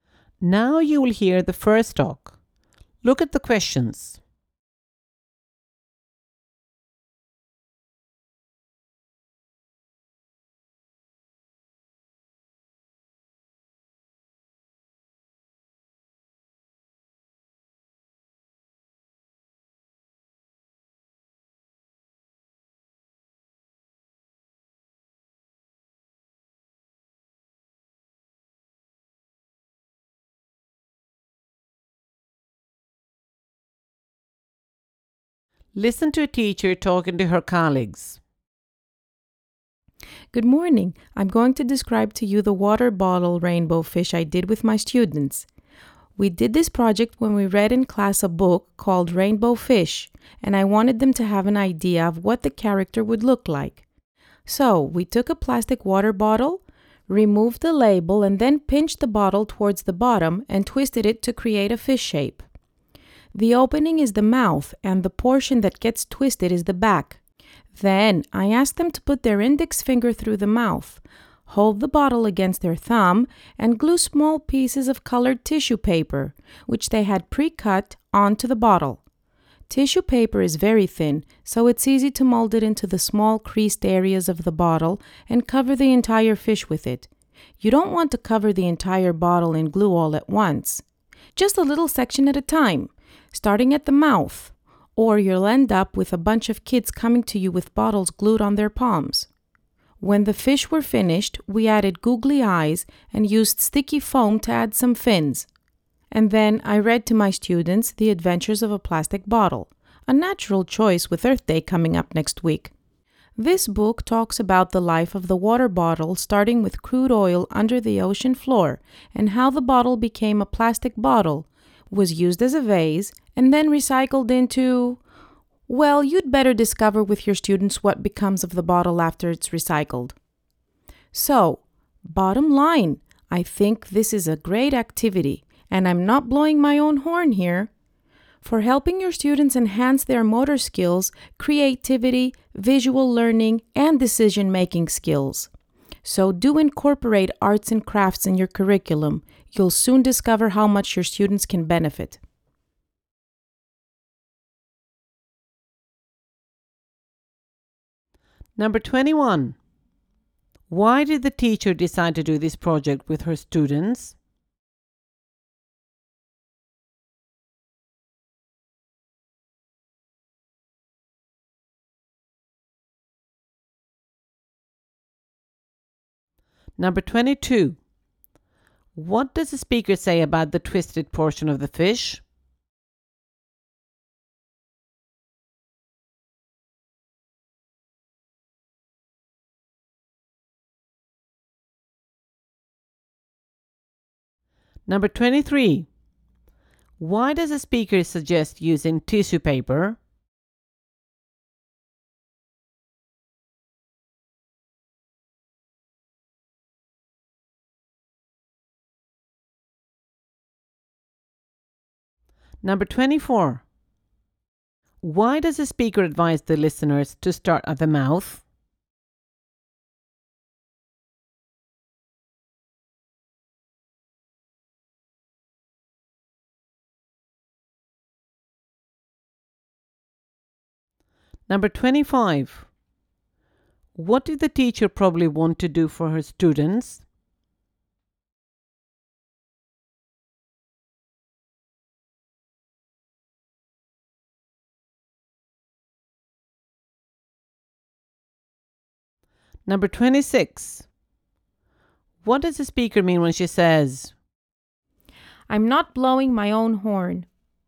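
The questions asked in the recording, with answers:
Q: Why did the teacher decide to do this project with her students?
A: Because the class read Rainbow Fish and she wanted them to see what the character looks like

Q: What does the speaker say about the twisted portion of the fish?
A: It is the back of the fish

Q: Why does the speaker suggest using tissue paper?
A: It is thin, so it is easy to mold into the creased areas

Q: Why does the speaker advise the listeners to start at the mouth?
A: Otherwise the kids end up with bottles glued to their palms

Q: What does the speaker mean when she says,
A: She is not boasting about herself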